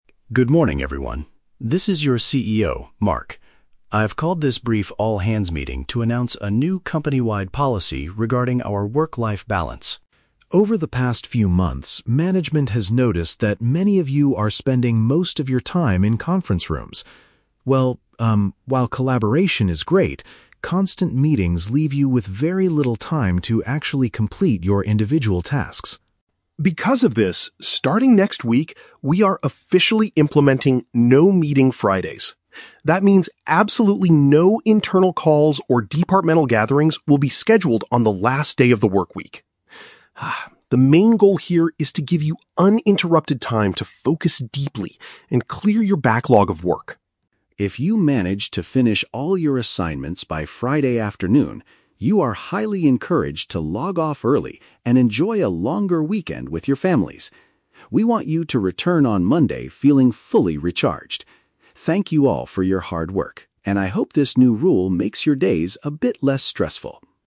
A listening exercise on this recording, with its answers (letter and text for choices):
Listen to the announcement from a company CEO and choose the correct answer (A, B, or C).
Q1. Why is the CEO introducing the new policy?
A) Because staff members lack the time to finish their personal assignments.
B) Because employees spend too much time talking with clients in conference rooms.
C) Because the management wants to reduce electricity costs in the building.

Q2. What is the main rule of "No-Meeting Fridays"?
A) Staff are allowed to work from home to avoid workplace stress.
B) Staff cannot organize any internal discussions on the final day of the week.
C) Staff must stay in the office until all their backlogged work is cleared.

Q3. What benefit does the CEO mention for finishing work quickly on Friday?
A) Employees will receive a special financial bonus for their hard work.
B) Employees will be given an extra day off on Monday to recharge.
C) Employees can finish their shift and leave earlier than usual.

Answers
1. A) Because staff members lack the time to finish their personal assignments.
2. B) Staff cannot organize any internal discussions on the final day of the week.
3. C) Employees can finish their shift and leave earlier than usual.

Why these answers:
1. The CEO says that "constant meetings leave you with very little time to actually complete your individual tasks." The phrase "personal assignments" is a paraphrase of individual tasks, and "lack the time" paraphrases having very little time. Trap Analysis: Option (B) is the trap. The script mentions "conference rooms," but the meetings are internal (with colleagues), not with "clients." Option (C) is a plausible corporate policy but is never mentioned in the audio.
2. The CEO states that "no internal calls or departmental gatherings will be scheduled on the last day of the workweek." "Internal discussions" is a paraphrase of calls/gatherings, and "final day of the week" means Friday. Trap Analysis: Option (C) is the trap. The script mentions clearing the "backlog of work," but it does not force employees to stay until it is cleared. Instead, it gives them time to focus. Option (A) is a common work-life balance policy but is not mentioned here.
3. The CEO says, "If you manage to finish all your assignments by Friday afternoon, you are highly encouraged to log off early." To "log off early" means to finish the shift and leave earlier than usual. Trap Analysis: Option (B) is the trap. The audio mentions the word "Monday" and "recharged," but the CEO wants them to return to work on Monday feeling recharged, not to take Monday off. Option (A) is a trap because "hard work" is mentioned, but a financial bonus is not.

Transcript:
This is your CEO, Mark. I've called this brief all-hands meeting to announce a new company-wide policy regarding our work-life balance.
Over the past few months, management has noticed that many of you are spending most of your time in conference rooms. Well, um, while collaboration is great, constant meetings leave you with very little time to actually complete your individual tasks.
Because of this, starting next week, we are officially implementing "No-Meeting Fridays." That means absolutely no internal calls or departmental gatherings will be scheduled on the last day of the workweek. Ah, the main goal here is to give you uninterrupted time to focus deeply and clear your backlog of work.
If you manage to finish all your assignments by Friday afternoon, you are highly encouraged to log off early and enjoy a longer weekend with your families. We want you to return on Monday feeling fully recharged. Thank you all for your hard work, and I hope this new rule makes your days a bit less stressful.